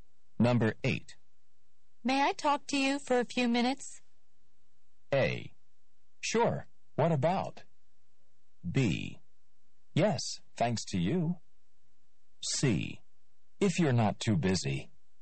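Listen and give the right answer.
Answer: A: Sure. What about?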